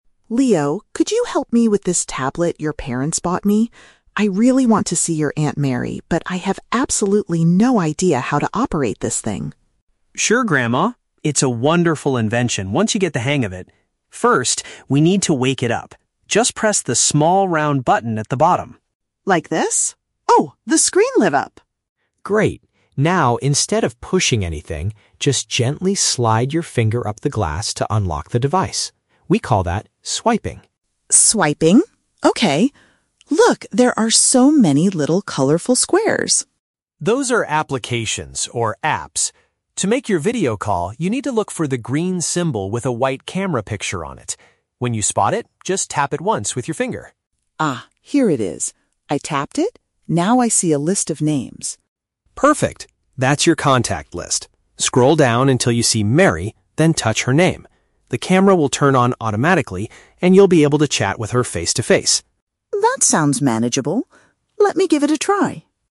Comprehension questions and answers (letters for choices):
Listen to a conversation between a grandson and his grandmother. For each question, choose the correct answer (A, B, or C).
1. How does Leo instruct his grandmother to unlock the tablet?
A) By pushing the round button twice.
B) By moving her finger upwards across the screen.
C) By typing a secret password on the keyboard.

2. What should the grandmother do to open the video calling application?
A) Tap on the green icon that shows a camera.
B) Search for Aunt Mary's name in a colorful square.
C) Press the white camera button on the back of the tablet.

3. What will happen immediately after she selects Aunt Mary's name?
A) She will have to turn on the camera manually.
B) She will hear a loud ringing sound from the speaker.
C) The device will automatically start a visual conversation.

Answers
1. B
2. A
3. C

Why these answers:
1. Leo tells his grandmother to "gently slide your finger up the glass to unlock the device." Option (B) is a direct paraphrase of this action. Option (A) is a trap; she presses the round button to "wake it up", not to unlock it. Option (C) is plausible for technology but is never mentioned in the audio.
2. Leo says, "look for the green symbol with a white camera picture on it. When you spot it, just tap it once." Option (A) uses synonyms ("icon" instead of "symbol", "shows" instead of "picture on it"). Option (B) is a trap; she finds the name after opening the app. Option (C) is a trap because the camera picture is on the screen, not a physical button on the back.
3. Leo explains that "The camera will turn on automatically, and you'll be able to chat with her face-to-face." Option (C) paraphrases "chat face-to-face" as "visual conversation." Option (A) is the exact opposite of what is said (the camera turns on automatically, not manually). Option (B) sounds plausible but is not mentioned in the conversation.

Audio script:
Grandma: Leo, could you help me with this tablet your parents bought me? I really want to see your Aunt Mary, but I have absolutely no idea how to operate this thing.
Leo: Sure, Grandma! It's a wonderful invention once you get the hang of it. First, we need to wake it up. Just press the small round button at the bottom.
Grandma: Like this? Oh, the screen lit up!
Leo: Great. Now, instead of pushing anything, just gently slide your finger up the glass to unlock the device. We call that "swiping".
Grandma: Swiping... okay. Look, there are so many little colorful squares!
Leo: Those are applications, or "apps." To make your video call, you need to look for the green symbol with a white camera picture on it. When you spot it, just tap it once with your finger.
Grandma: Ah, here it is. I tapped it. Now I see a list of names.
Leo: Perfect. That's your contact list. Scroll down until you see "Mary", then touch her name. The camera will turn on automatically, and you'll be able to chat with her face-to-face.